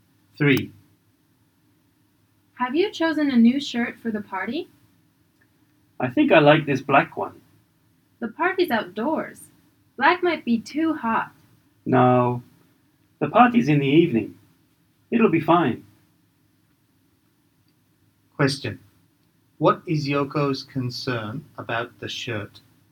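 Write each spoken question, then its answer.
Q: What is Yoko's concern about the shirt?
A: A black shirt might be too hot for an outdoor party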